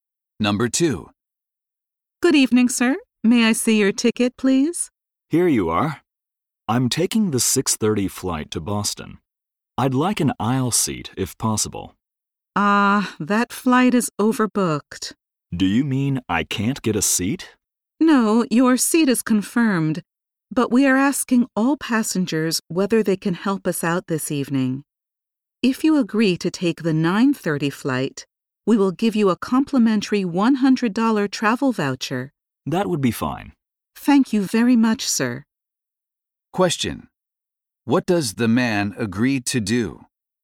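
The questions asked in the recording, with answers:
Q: What does the man agree to do?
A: Take the later 9:30 flight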